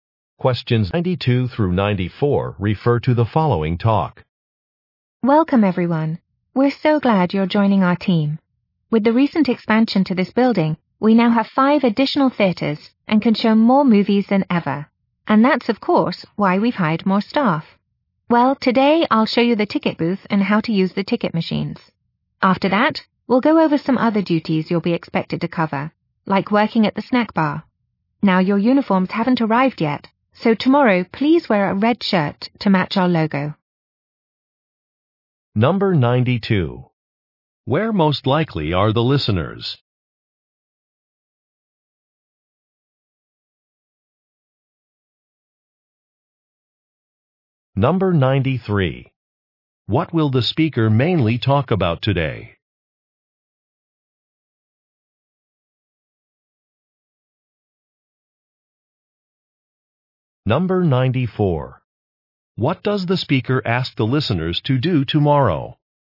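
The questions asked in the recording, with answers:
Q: Where most likely are the listeners?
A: At a movie theater

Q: What will the speaker mainly talk about today?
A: Job duties, such as using the ticket machines

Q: What does the speaker ask the listeners to do tomorrow?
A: Wear a red shirt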